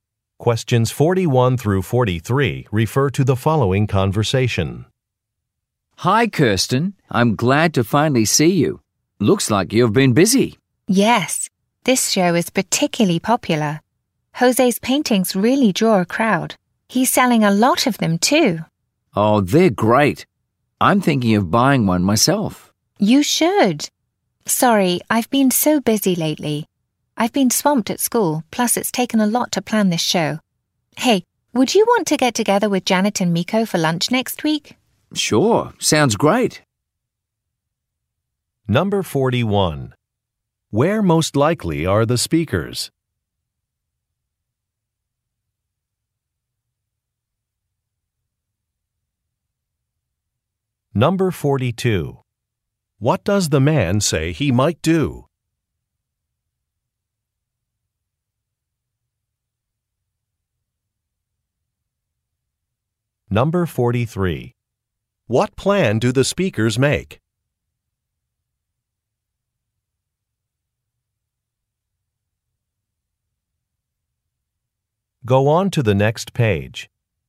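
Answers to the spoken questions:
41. At an art exhibition (gallery)
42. Buy a painting
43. To have lunch with Janet and Miko next week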